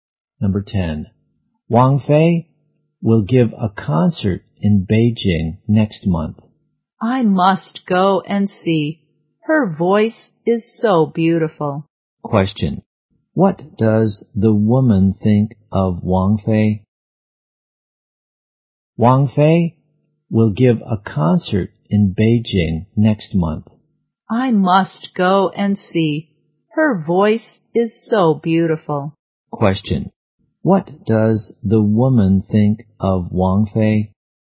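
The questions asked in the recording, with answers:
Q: what does the woman think of Wang Fei?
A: Her voice is very beautiful.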